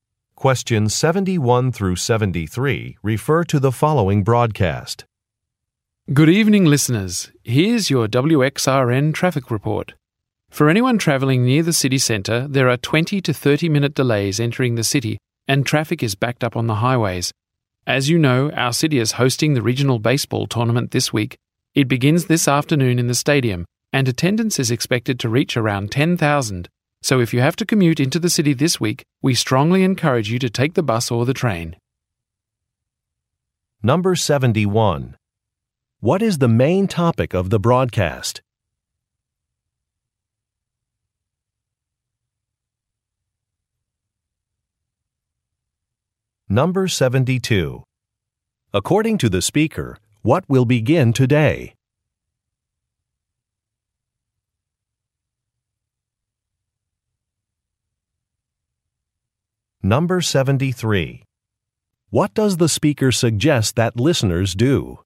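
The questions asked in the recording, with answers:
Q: What is the main topic of the broadcast?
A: Traffic delays in the city

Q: According to the speaker, what will begin today?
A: The regional baseball tournament

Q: What does the speaker suggest that listeners do?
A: Take the bus or the train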